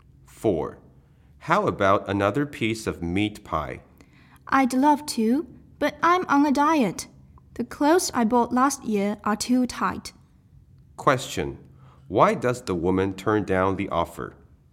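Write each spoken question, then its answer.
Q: Why does the woman turn down the offer?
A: She is on a diet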